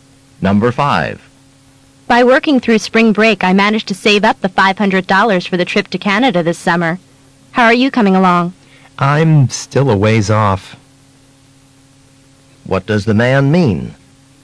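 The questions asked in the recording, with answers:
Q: What does the man mean?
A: He hasn't saved enough money yet.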